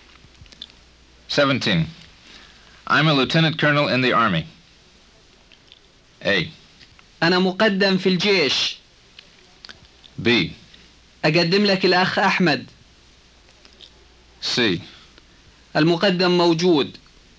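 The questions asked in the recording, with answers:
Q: I'm a Lieutenant Colonel in the Army.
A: A: انا مقدم في الجيش.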